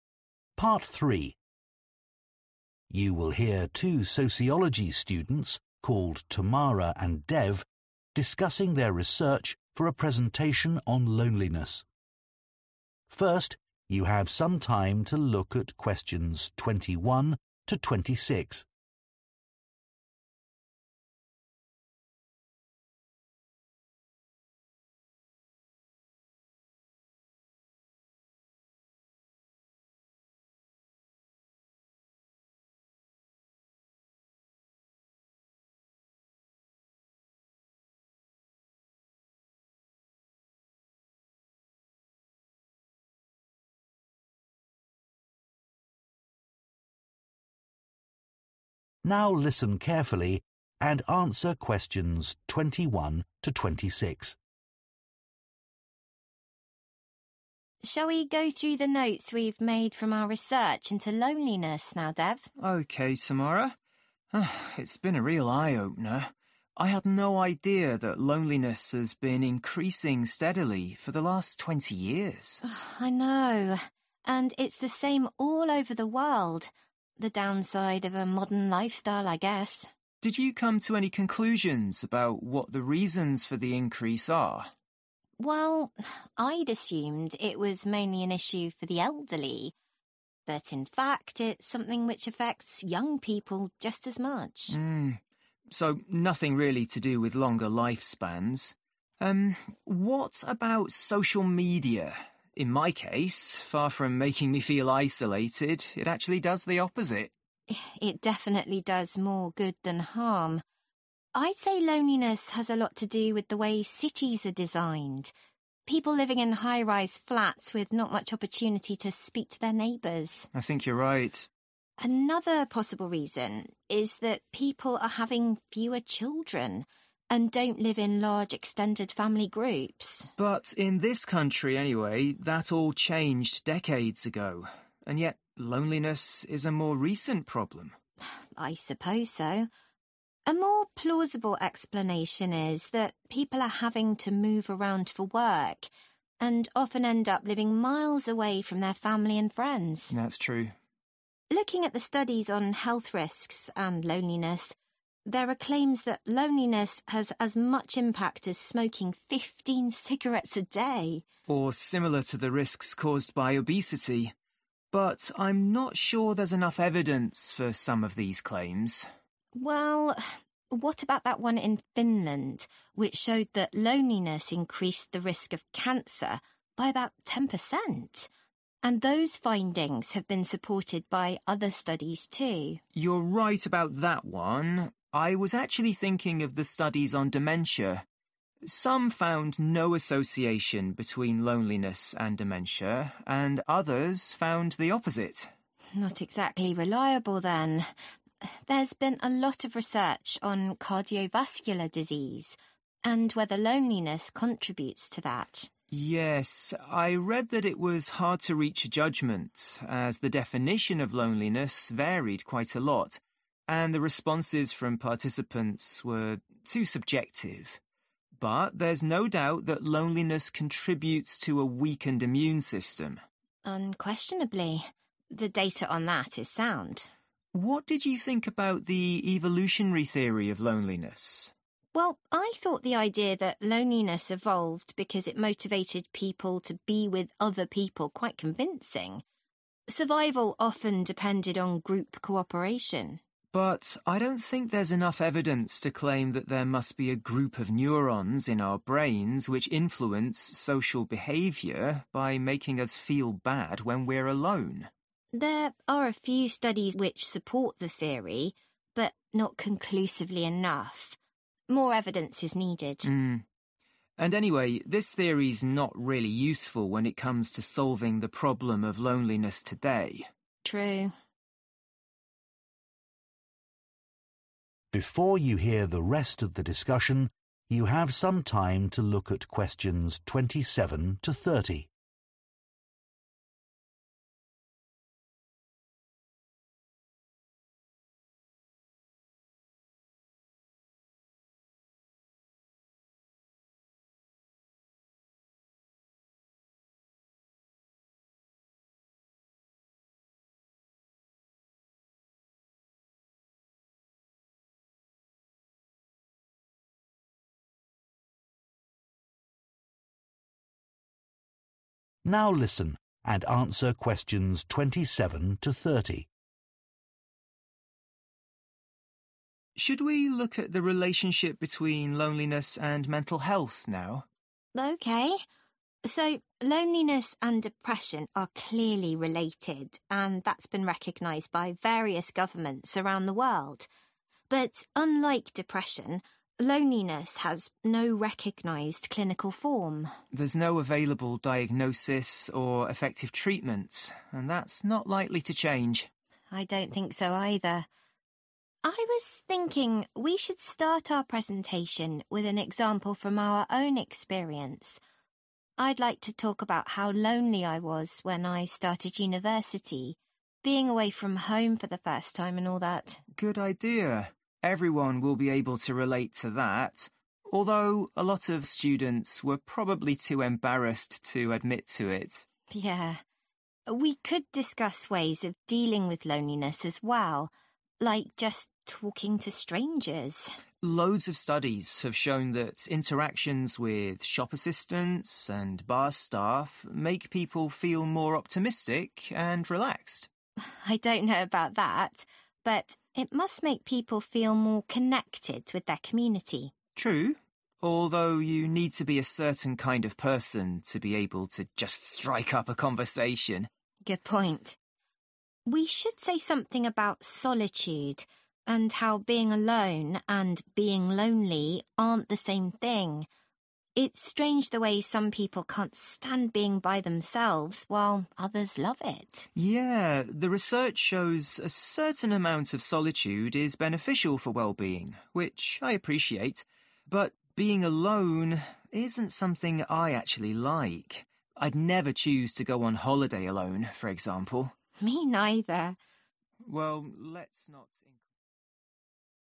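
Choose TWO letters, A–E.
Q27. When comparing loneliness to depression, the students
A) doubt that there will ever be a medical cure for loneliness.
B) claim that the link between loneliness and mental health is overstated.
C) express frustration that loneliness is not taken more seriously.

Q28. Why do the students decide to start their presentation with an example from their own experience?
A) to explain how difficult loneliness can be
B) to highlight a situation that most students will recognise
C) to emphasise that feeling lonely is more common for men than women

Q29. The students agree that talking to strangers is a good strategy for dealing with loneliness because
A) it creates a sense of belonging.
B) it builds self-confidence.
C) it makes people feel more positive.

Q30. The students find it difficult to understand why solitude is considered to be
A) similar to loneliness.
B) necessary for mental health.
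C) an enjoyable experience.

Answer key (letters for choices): 27A, 28B, 29A, 30C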